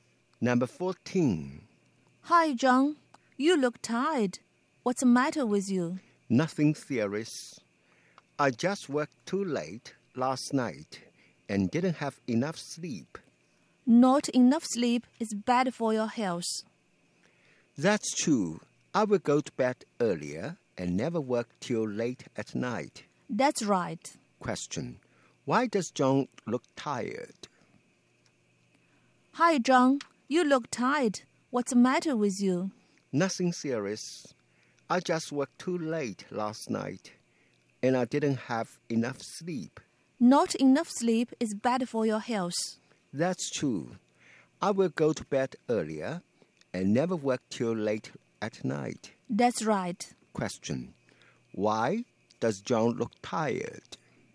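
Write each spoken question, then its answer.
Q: Why does John look tired?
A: He worked too late last night and didn't have enough sleep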